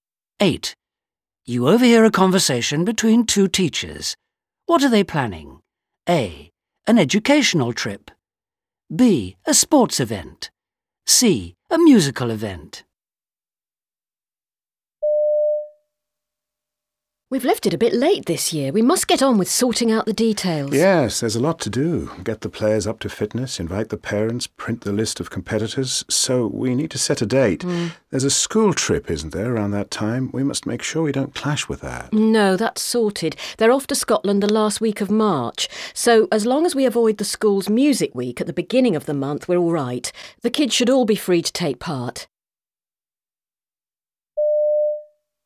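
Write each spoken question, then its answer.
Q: What are they planning?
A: B: A sports event.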